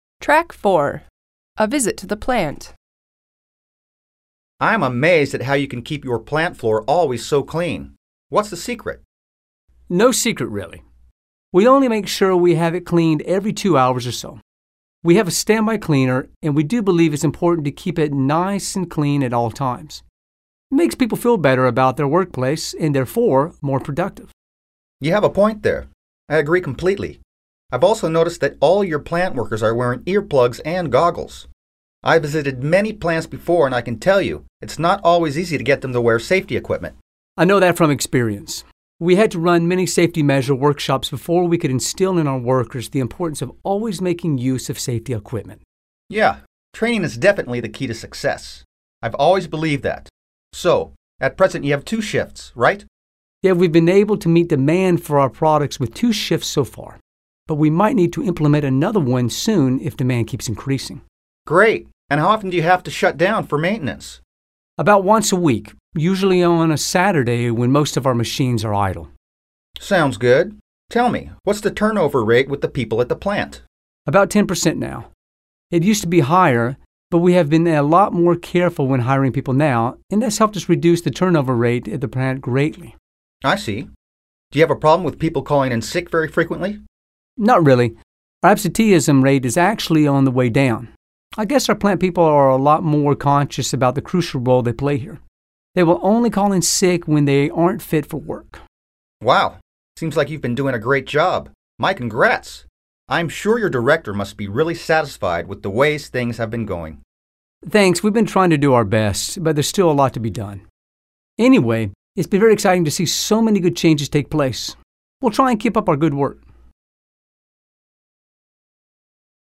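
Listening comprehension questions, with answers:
Dialogue comprehension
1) The cleanliness of the plant has not impressed James at all.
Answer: False

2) Getting the plant people to wear safety equipment was pretty easy.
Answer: False

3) The plant shuts down for maintenance once a month.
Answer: False

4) The turnover rate at the plant used to be higher than it is now.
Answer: True

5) According to the plant manager they have a problem with people calling in sick very often.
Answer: False

Find words or expressions in the dialogue with the following similar meanings:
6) Until now:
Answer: so far

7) A device to protect the ears from loud noises:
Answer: earplugs

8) Protective glasses:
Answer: goggles

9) The state of being absent from work:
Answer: absenteeism

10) A period of work time in a factory or other place:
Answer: shift

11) The amount of a product or service that a customer is willing to buy:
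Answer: demand

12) The places where people work:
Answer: workplace

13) Stop operating:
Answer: shut down

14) Inactive:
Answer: idle

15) The rate at which employees leave a company and are replaced:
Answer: turnover rate

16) Call one's place of work to say you are ill and cannot come to work:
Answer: call in sick

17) Introduce into the mind:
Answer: instill

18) Happen; occur:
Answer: take place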